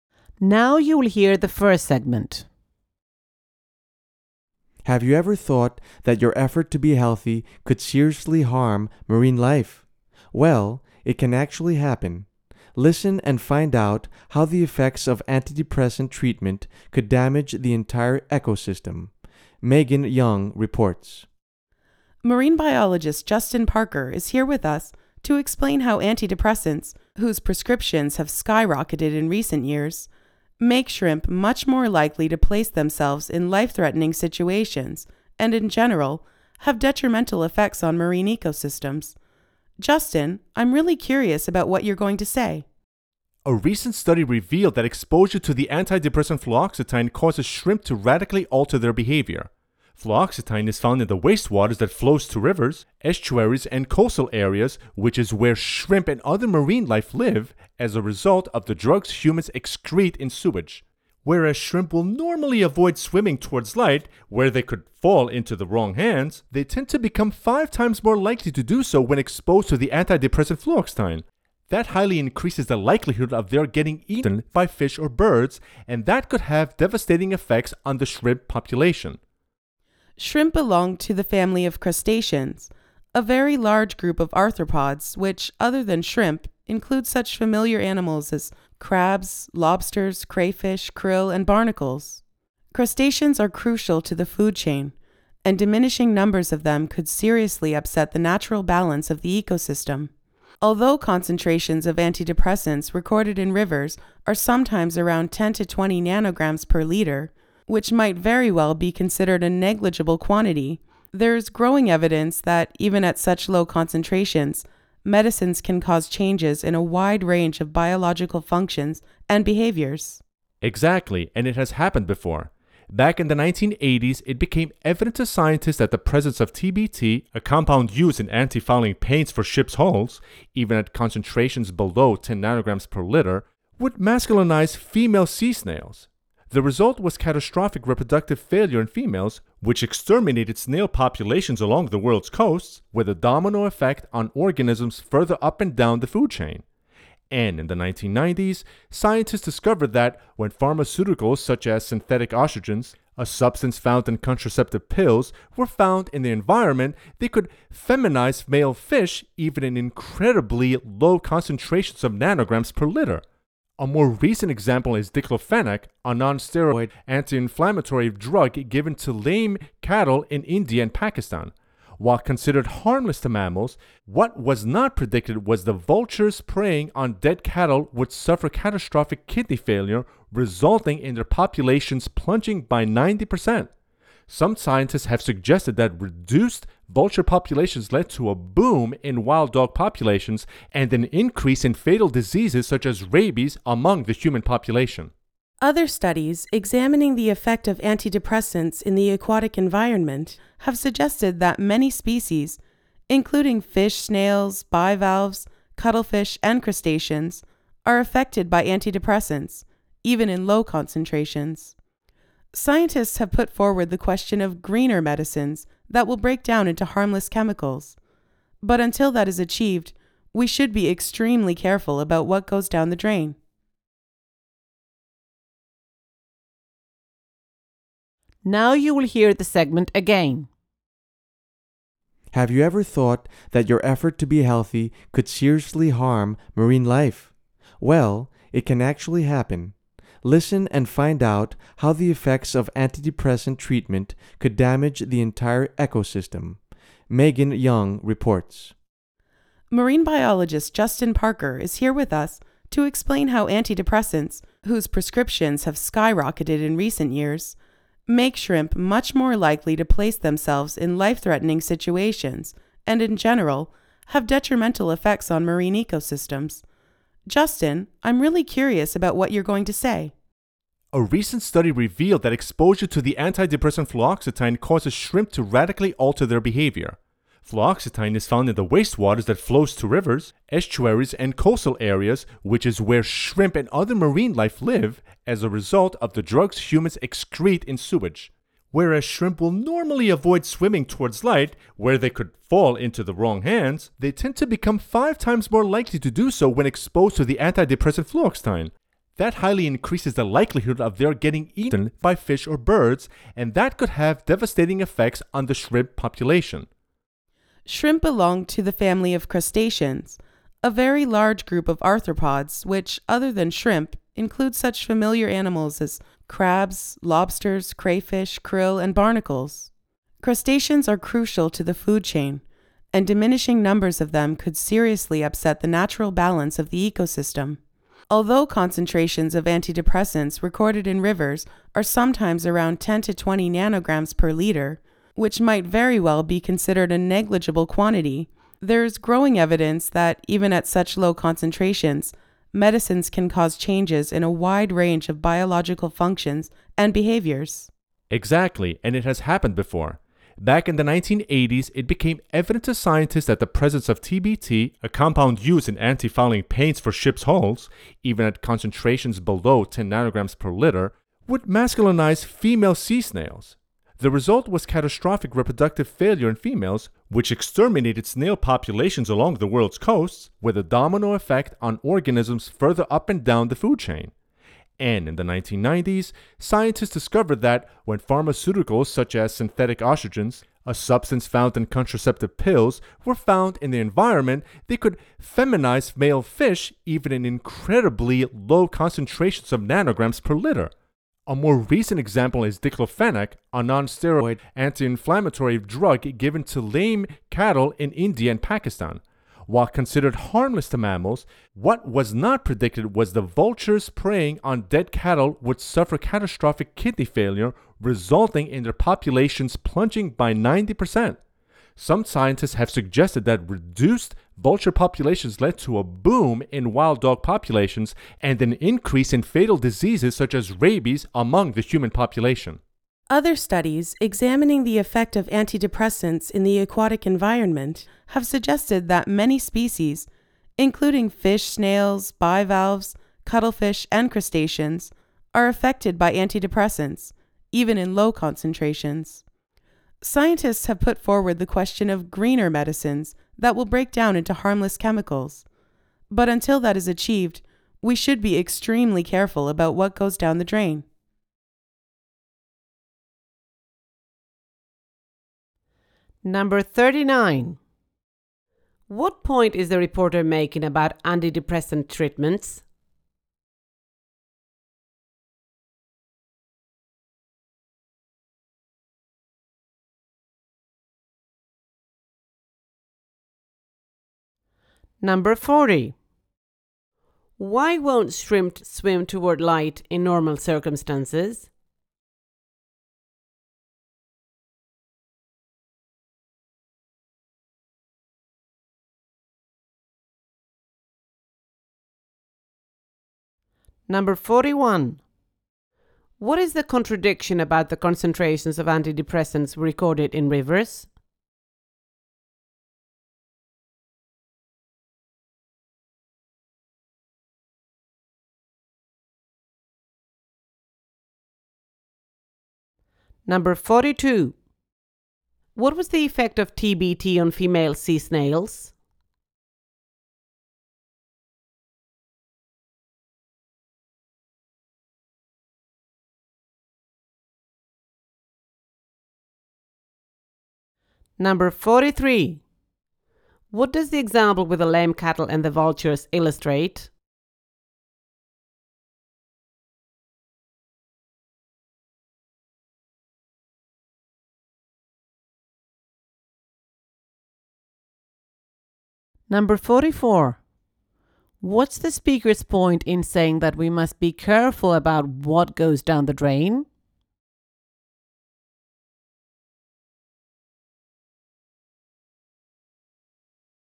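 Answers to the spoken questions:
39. Efforts to be healthy with antidepressants can seriously harm marine life and damage the whole ecosystem
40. Because they could be eaten by fish or birds (predators)
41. They are tiny and seem negligible, but can still change many biological functions and behaviors
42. It masculinized them, causing reproductive failure that wiped out snail populations
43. A drug thought harmless can have unexpected, catastrophic effects down the food chain
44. Until greener medicines exist, drugs we flush away pollute waters and harm marine life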